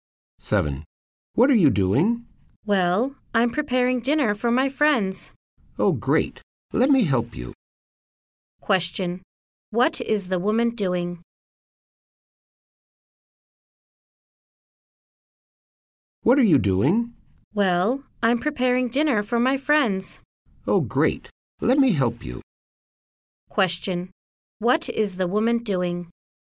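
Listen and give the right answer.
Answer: She is preparing dinner for her friends.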